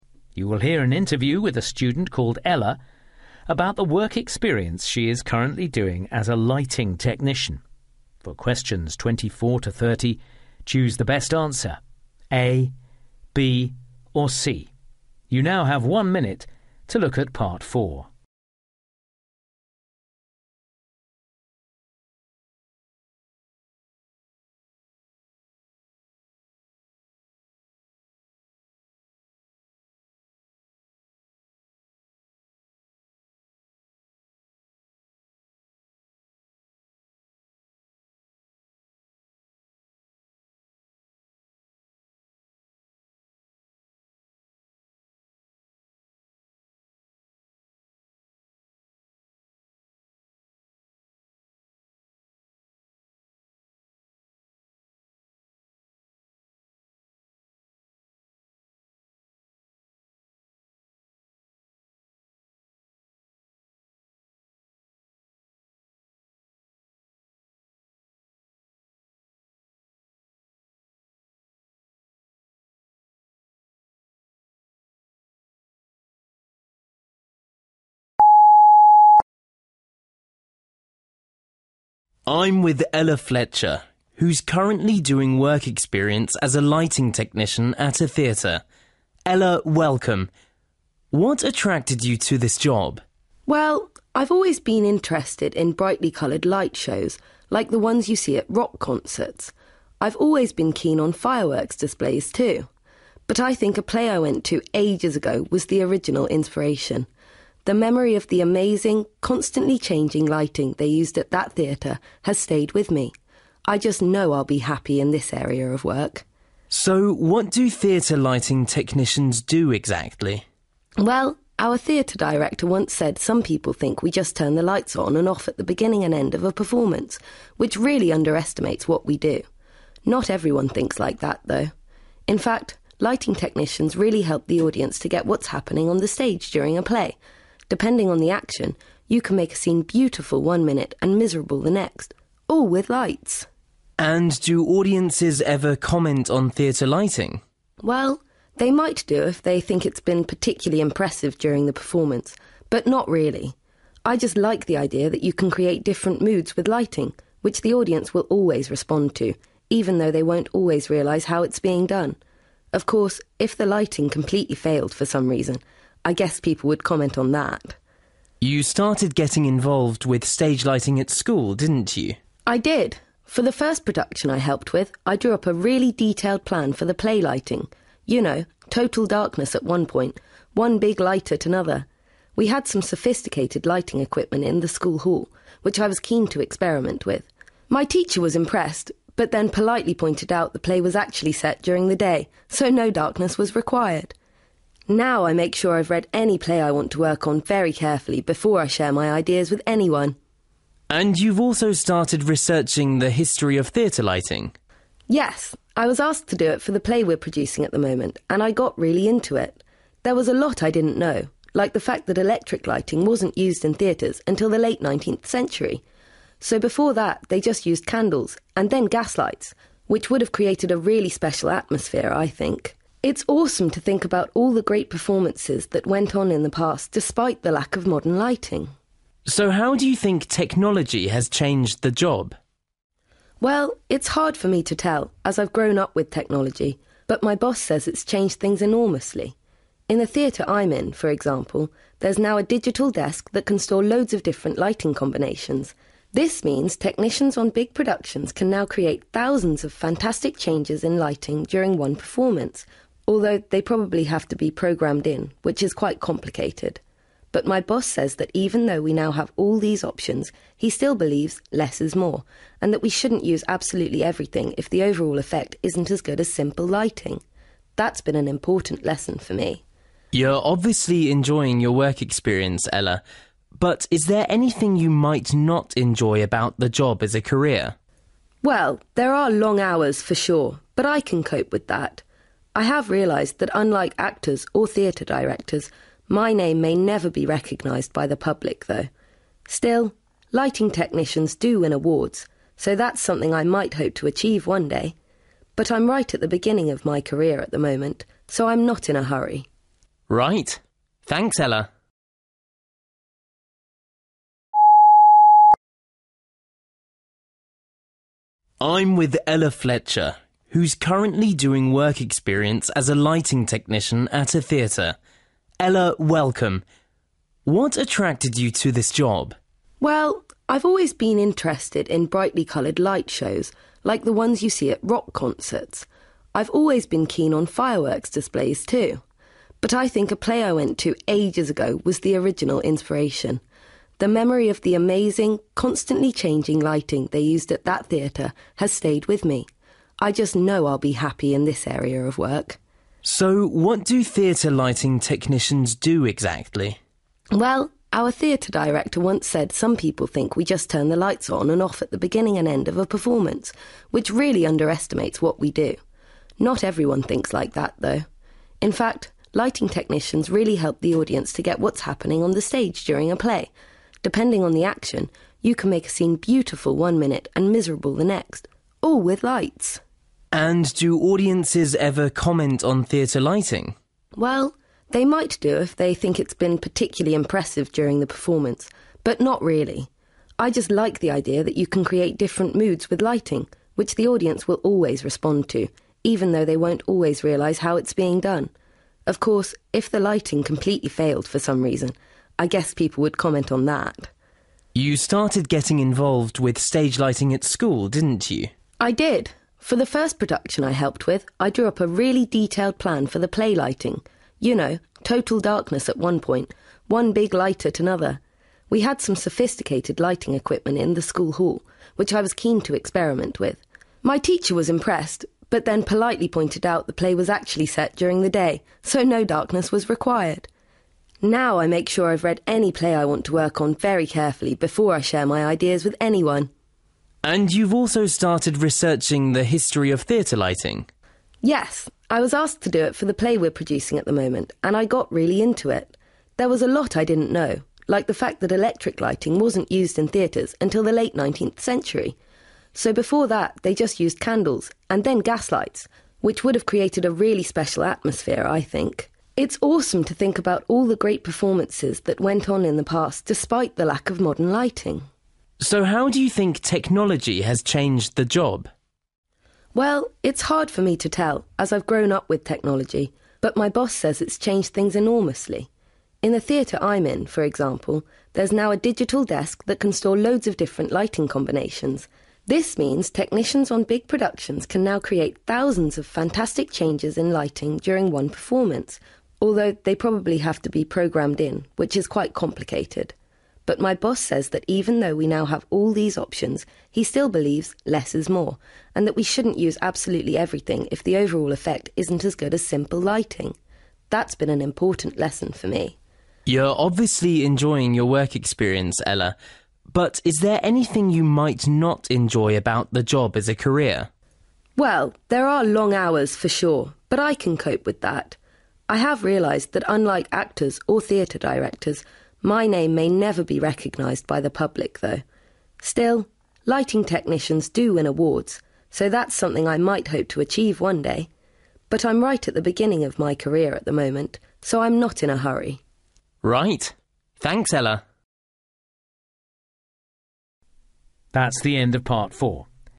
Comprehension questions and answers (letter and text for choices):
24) Ella suggests that her interest in lighting started with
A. the lights she once saw at a theatre show.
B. an outstanding light show at a rock concert.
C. the effects of a fireworks display.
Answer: A. the lights she once saw at a theatre show.

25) Ella says that the work of theatre lighting technicians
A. can vary according to the director they're working with.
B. can be more complex than she'd initially realised.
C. can be important for people's understanding of a play.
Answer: C. can be important for people's understanding of a play.

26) Ella thinks that members of a theatre audience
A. only really notice the lighting when something goes wrong.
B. generally appreciate what good lighting adds to a performance.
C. rarely react to lighting effects.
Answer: A. only really notice the lighting when something goes wrong.

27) Ella mentions an early lighting plan she made at school that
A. relied on technology that the school didn't have.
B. was too difficult for anyone to follow.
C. overlooked a key point about the play it was intended for.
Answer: C. overlooked a key point about the play it was intended for.

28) During her research into theatre lighting, Ella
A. felt disappointed to find that she knew so little about it.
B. was impressed at what theatres achieved before using electricity.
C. wondered whether modern lighting has spoilt the atmosphere in theatres.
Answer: B. was impressed at what theatres achieved before using electricity.

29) After seeing the technology available for modern theatre lighting, Ella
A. is excited by the creative possibilities it offers.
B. thinks it has made a technician's job easier than it used to be.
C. has realised it's important not to use it unnecessarily.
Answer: C. has realised it's important not to use it unnecessarily.

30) What does Ella feel might be a disadvantage of the job?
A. It will probably always involve long hours.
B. She may never become famous for what she does.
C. It could take her years to reach the top of her profession.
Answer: B. She may never become famous for what she does.

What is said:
Interviewer: I'm with Ella Fletcher, who's currently doing work experience as a lighting technician at a theatre. Ella, welcome. What attracted you to this job?
Ella: Well, I've always been interested in brightly-coloured light shows, like the ones you see at rock concerts. I've always been keen on fireworks displays too. But I think a play I went to ages ago was the original inspiration – the memory of the amazing, constantly changing lighting they used at that theatre has stayed with me. I just know I'll be happy in this area of work.
Interviewer: So what do theatre lighting technicians do, exactly?
Ella: Well, our theatre director once said some people think we just turn the lights on and off at the beginning and end of a performance – which really underestimates what we do! Not everyone thinks like that, though! In fact, lighting technicians really help the audience to get what's happening on the stage during a play. Depending on the action, you can make a scene beautiful one minute and miserable the next – all with lights!
Interviewer: And to audiences ever comment on theatre lighting?
Ella: Well, they might do if they think it's been particularly impressive during the performance, but not really. I just like the idea that you can create different moods with lighting – which the audience will always respond to, even though they won't always realise how it's being done. Of course, if the lighting completely failed for some reason, I guess people would comment on that!
Interviewer: You started getting involved with stage lighting at school, didn't you?
Ella: I did. For the first production I helped with, I drew up a really detailed plan for the play lighting – you know, total darkness at one point, one big light at another. We had some sophisticated lighting equipment in the school hall, which I was keen to experiment with. My teacher was impressed – but then politely pointed out the play was actually set during the day, so no darkness was required! Now I make sure I've read any play I want to work on very carefully before I share my ideas with anyone!
Interviewer: And you've also started researching the history of theatre lighting.
Ella: Yes, I was asked to do it for the play we're producing at the moment, and I got really into it! There was a lot I didn't know, like the fact that electric lighting wasn't used in theatres until the late 19th century. So before that, they just used candles, and then gaslights – which would have created a really special atmosphere, I think. It's awesome to think about all the great performances that went on in the past despite the lack of modern lighting.
Interviewer: So how do you think technology has changed the job?
Ella: Well, it's hard for me to tell, as I've grown up with technology, but my boss says it's changed things enormously. In the theatre I'm in, for example, there's now a digital desk that can store loads of different lighting combinations. This means technicians on big productions can now create thousands of fantastic changes in lighting during one performance, although they probably have to be programmed in, which is quite complicated. But my boss says that even though we now have all these options, he still believes 'less is more' and that we shouldn't use absolutely everything if the overall effect isn't as good as simple lighting. That's been an important lesson for me.
Interviewer: You're obviously enjoying your work experience, Ella. But is there anything you might not enjoy about the job as a career?
Ella: Well, there are long hours, for sure, but I can cope with that! I have realised that unlike actors or theatre directors, my name may never be recognised by the public, though. Still, lighting technicians do win awards, so that's something I might hope to achieve one day! But I'm right at the beginning of my career at the moment, so I'm not in a hurry.
Interviewer: Right! Thanks, Ella!